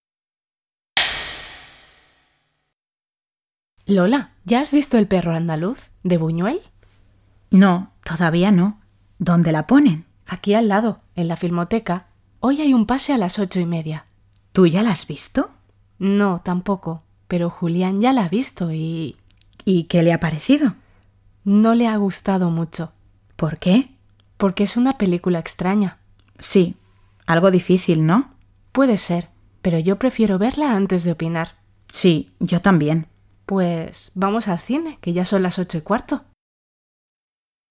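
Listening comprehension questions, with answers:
Escucha el diálogo y responde a las preguntas:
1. ¿De quién es la película?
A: De Buñuel

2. ¿Ha visto la película la amiga de Lola?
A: No, todavía no

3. ¿Dónde ponen la película?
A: En la filmoteca

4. ¿A qué hora es la película?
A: A las 8:30

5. ¿A Julián le ha gustado la película?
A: No mucho, porque es una película extraña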